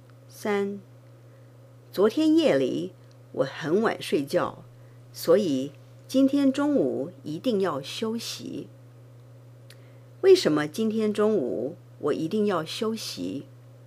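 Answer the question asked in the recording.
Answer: 因为昨天夜里很晚睡觉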